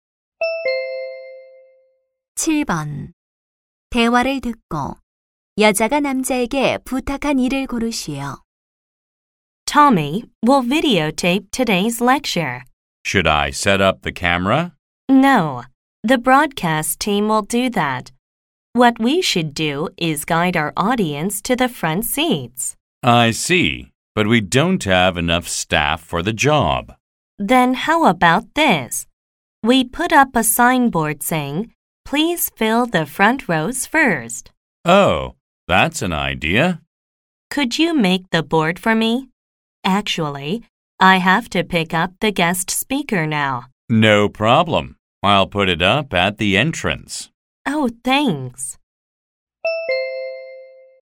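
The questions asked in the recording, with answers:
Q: 대화를 듣고 여자가 남자에게 부탁한 일을 고르시오.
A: 안내판 만들기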